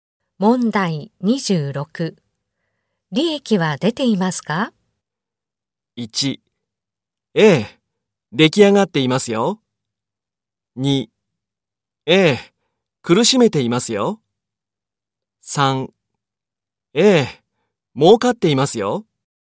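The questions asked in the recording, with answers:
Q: 利益は出ていますか?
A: 3: ええ、儲かっていますよ。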